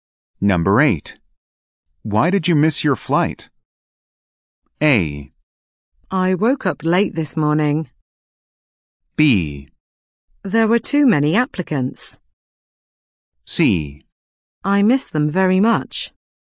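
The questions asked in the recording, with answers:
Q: Why did you miss your flight?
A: A: I woke up late this morning.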